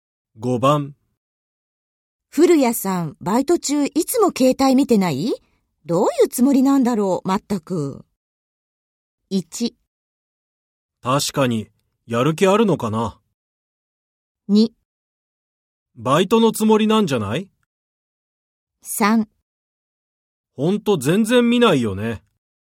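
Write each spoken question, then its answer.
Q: 古谷さん、バイト中いつも携帯見てない?どういうつもりなんだろう、まったく。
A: 1: 確かに、やる気あるのかな。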